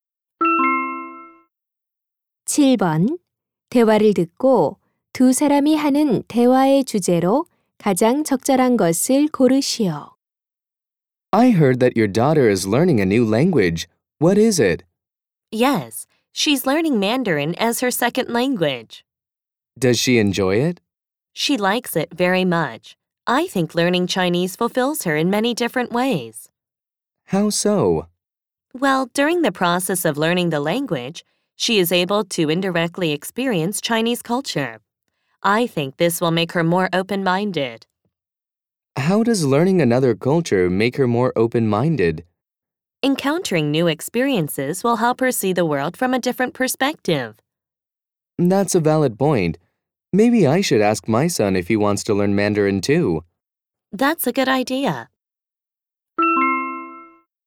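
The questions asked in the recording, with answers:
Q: 대화를 듣고 두 사람이 하는 대화의 주제로 가장 적절한 것을 고르시오.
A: 외국어 학습의 장점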